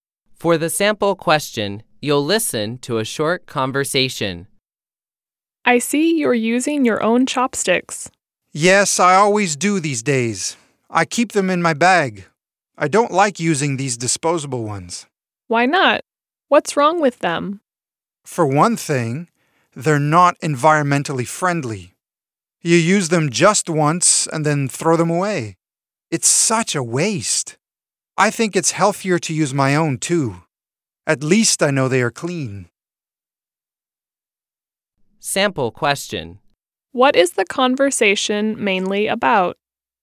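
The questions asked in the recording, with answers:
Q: What is the conversation mainly about?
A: Using your own chopsticks instead of disposable ones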